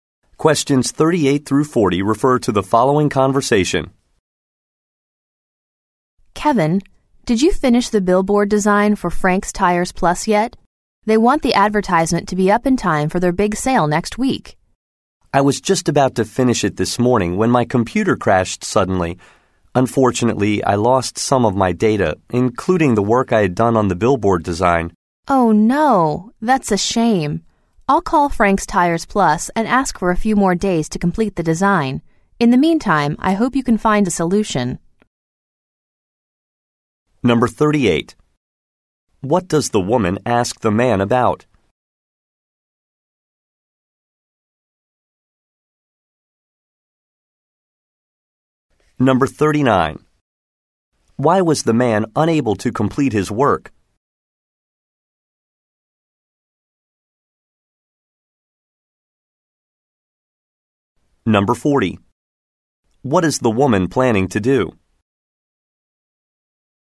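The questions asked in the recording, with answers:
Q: What does the woman ask the man about?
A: Whether he finished the billboard design

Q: Why was the man unable to complete his work?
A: His computer crashed and he lost data

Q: What is the woman planning to do?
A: Call the client to ask for more time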